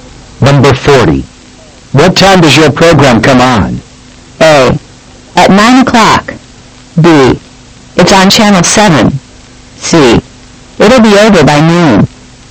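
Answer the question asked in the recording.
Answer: A: At 9 o'clock.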